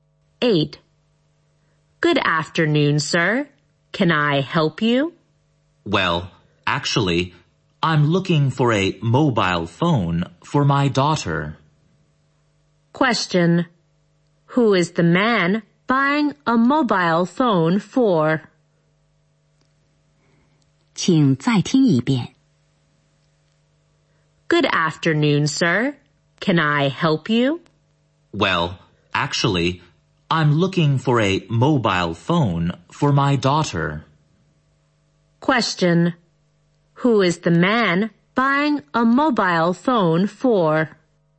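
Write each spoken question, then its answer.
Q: Question. Who is the man buying a mobile phone for?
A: His daughter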